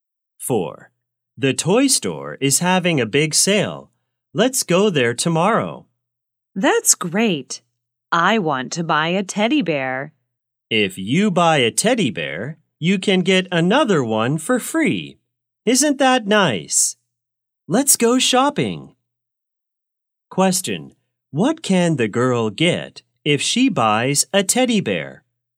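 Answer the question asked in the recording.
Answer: Another teddy bear for free.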